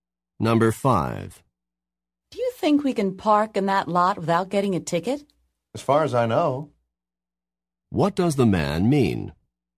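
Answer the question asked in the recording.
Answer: He thinks they can park there without a ticket.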